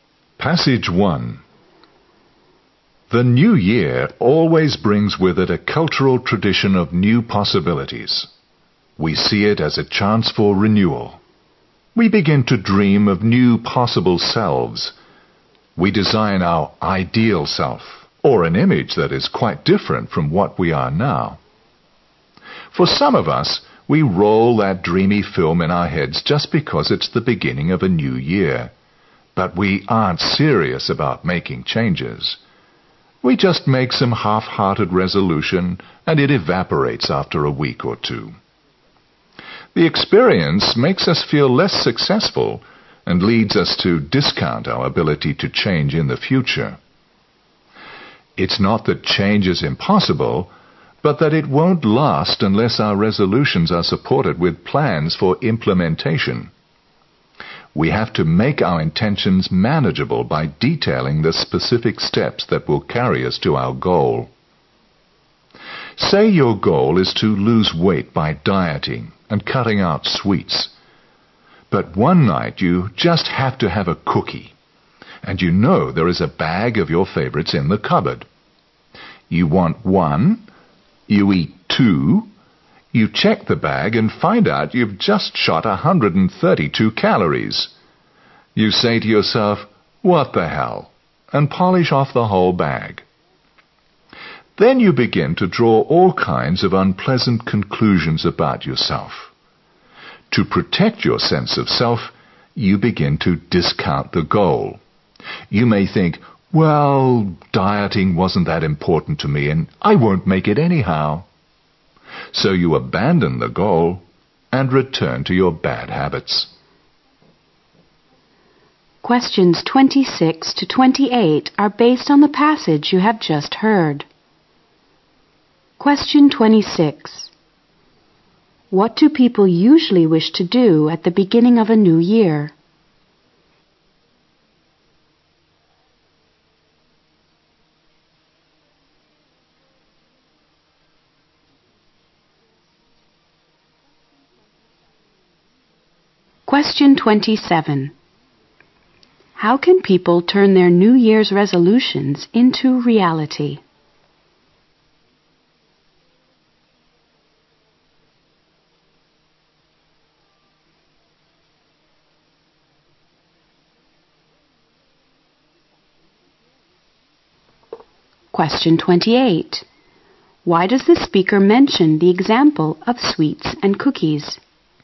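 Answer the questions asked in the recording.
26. Make changes and become a new, ideal self
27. By supporting them with specific plans for implementation
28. To show how people give up their resolutions without concrete plans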